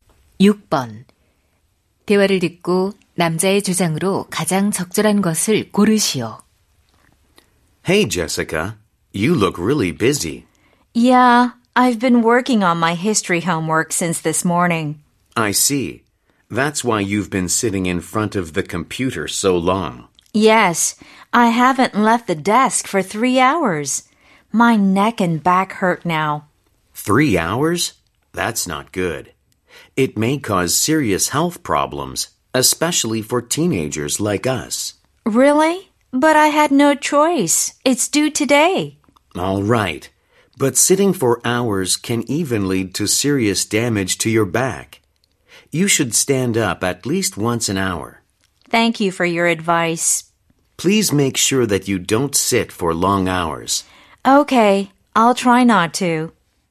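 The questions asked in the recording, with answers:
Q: 대화를 듣고 남자의 주장으로 가장 적절한 것을 고르시오.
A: 오랜 시간 앉아 있지 말고 적어도 한 시간에 한 번은 일어나야 한다.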